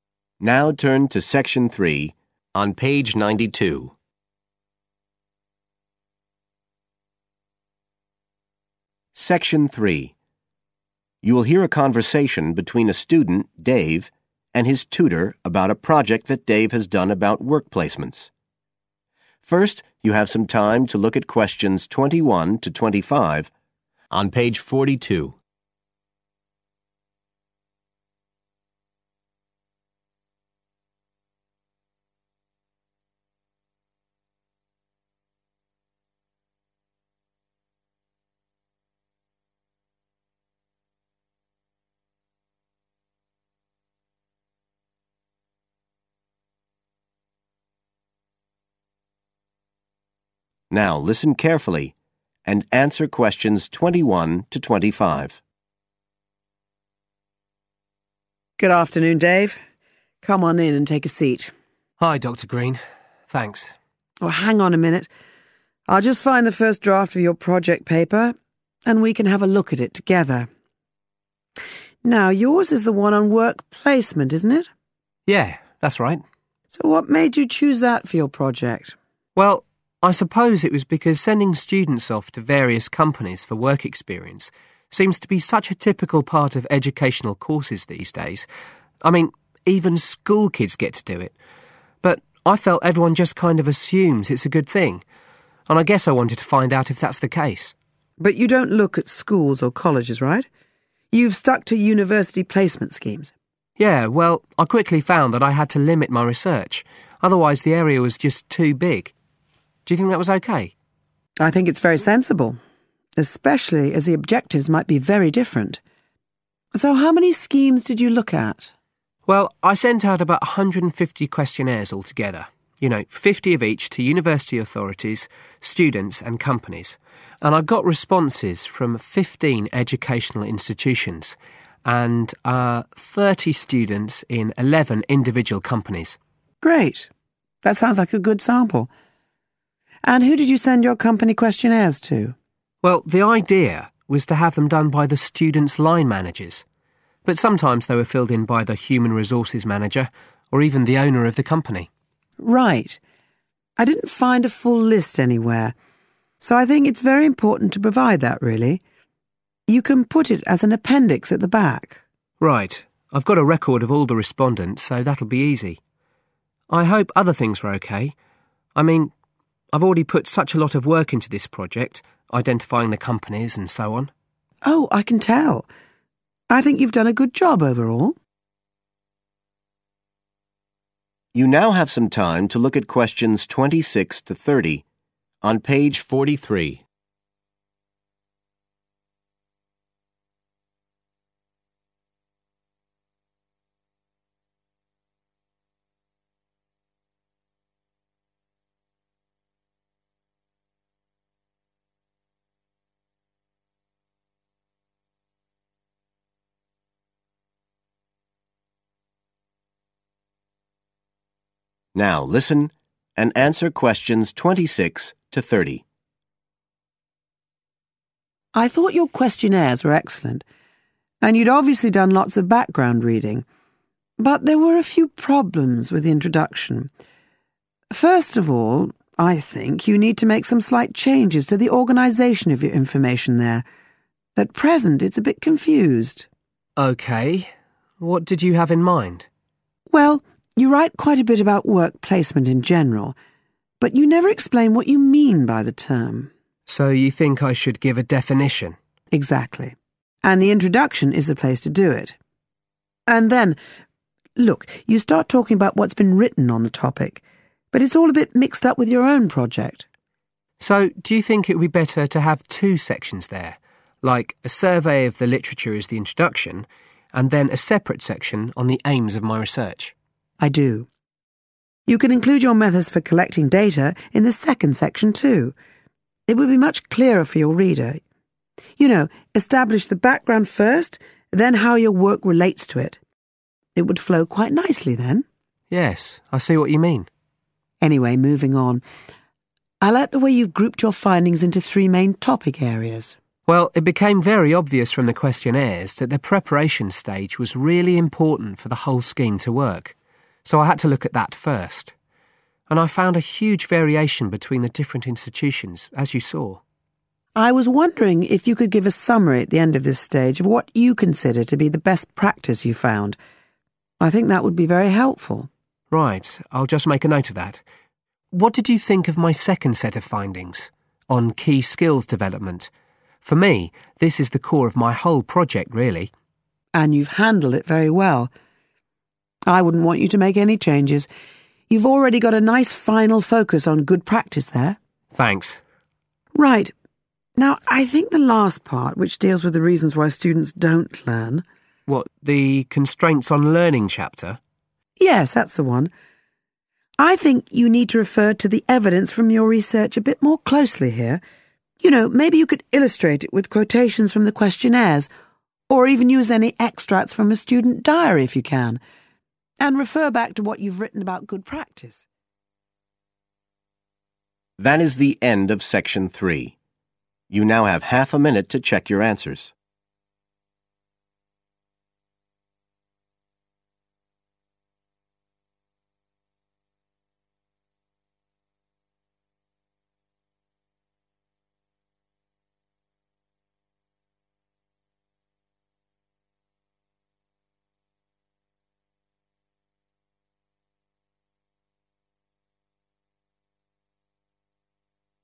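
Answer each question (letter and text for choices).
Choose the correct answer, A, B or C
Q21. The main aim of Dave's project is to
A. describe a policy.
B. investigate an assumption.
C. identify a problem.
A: B. investigate an assumption.

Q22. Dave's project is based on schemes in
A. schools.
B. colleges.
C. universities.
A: C. universities.

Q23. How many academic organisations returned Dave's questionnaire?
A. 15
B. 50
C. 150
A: A. 15

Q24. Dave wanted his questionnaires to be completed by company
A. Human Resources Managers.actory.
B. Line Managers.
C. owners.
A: B. Line Managers.

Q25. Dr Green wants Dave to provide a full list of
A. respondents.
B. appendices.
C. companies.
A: A. respondents.

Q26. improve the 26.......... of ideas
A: organisation

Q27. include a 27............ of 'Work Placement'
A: definition

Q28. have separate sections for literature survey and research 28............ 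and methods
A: aims

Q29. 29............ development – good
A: key skills

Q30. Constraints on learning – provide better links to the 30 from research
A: evidence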